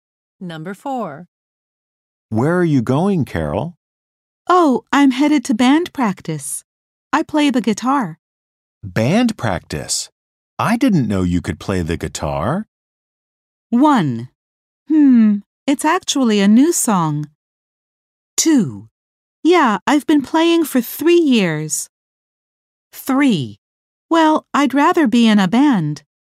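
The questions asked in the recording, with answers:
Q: Band practice?I didn't know you could play the guitar.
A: 2: Yeah, I've been playing for 3 years.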